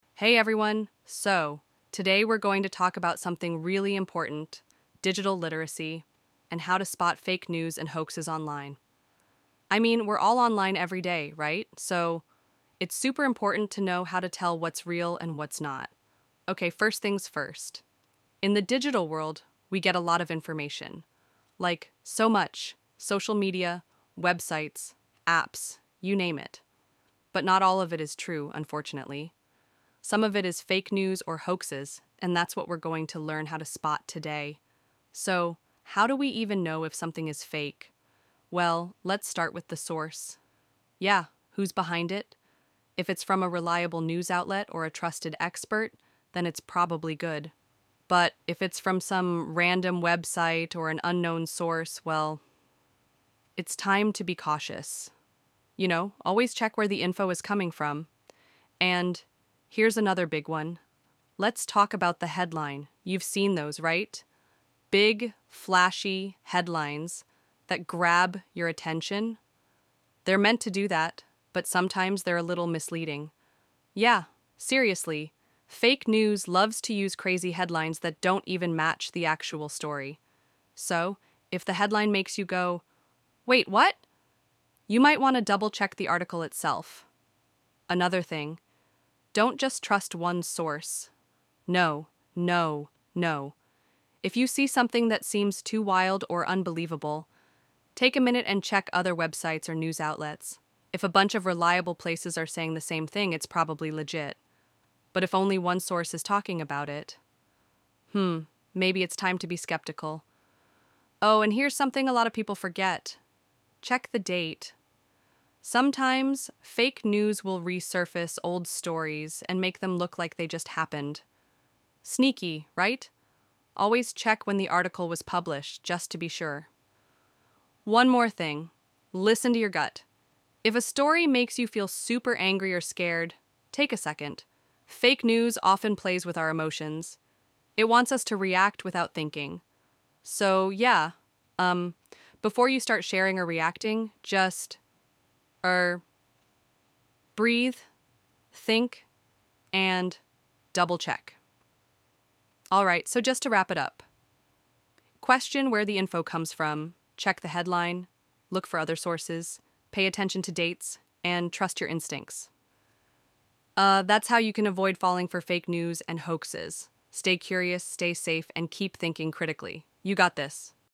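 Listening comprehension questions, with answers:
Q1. What is the first step in identifying fake news?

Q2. Why is it important to check multiple sources when evaluating information?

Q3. What could be the reason behind a misleading headline?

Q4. What is the relationship between checking the date of an article and spotting fake news?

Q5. What would be an appropriate action if a story seems too emotional and is making you react impulsively?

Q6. Why might a source of information be considered unreliable?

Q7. When evaluating fake news, why is it important to look at the multiple sources and dates?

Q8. What is one key way to check if a headline is misleading?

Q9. Why is it important to trust your instincts when reading potentially fake news?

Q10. What is the connection between emotional reactions and the spread of fake news?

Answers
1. Check the source of the information
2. If many reliable sources say the same thing, it is probably true
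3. To grab attention
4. Fake news may bring back old stories and make them look recent
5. Take a second, breathe, think and double check before sharing
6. It comes from a random website or unknown source
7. To confirm the story is reported by reliable outlets and is not an old story presented as new
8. Read the article itself to see if it matches the headline
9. Fake news plays with emotions to make us react without thinking
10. Fake news makes people angry or scared so they share or react without thinking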